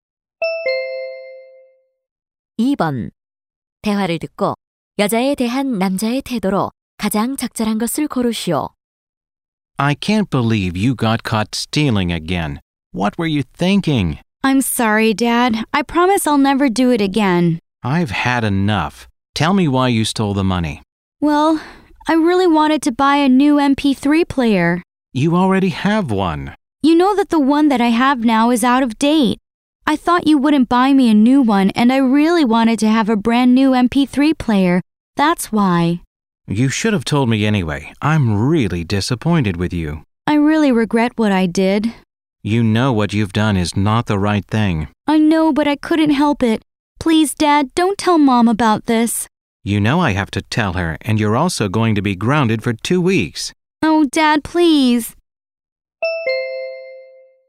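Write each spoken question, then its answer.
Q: 대화를 듣고 여자에 대한 남자의 태도로 가장 적절한 것을 고르시오.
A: 실망함 (disappointed)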